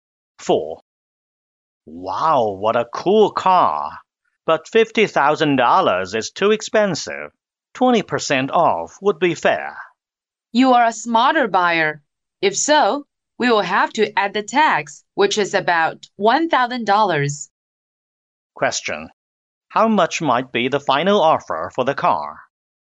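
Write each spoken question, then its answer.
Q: How much might be the final offer for the car?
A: About $41,000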